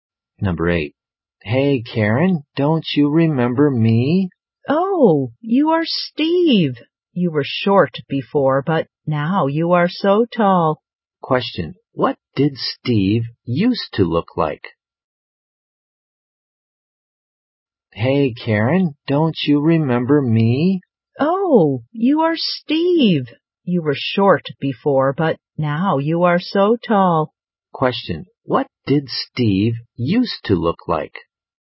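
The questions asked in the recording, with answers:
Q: Question, what did Steve used to look like?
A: Short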